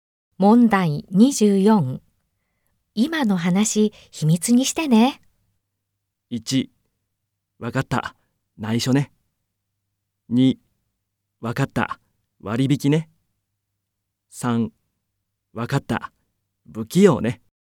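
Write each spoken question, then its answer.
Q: 今の話、秘密にしてね。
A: 1: わかった。内緒ね。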